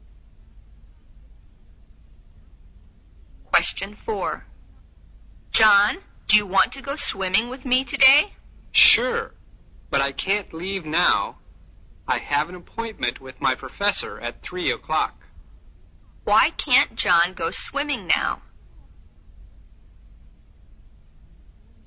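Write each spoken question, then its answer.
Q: Why can't John go swimming now?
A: He has an appointment with his professor at 3 o'clock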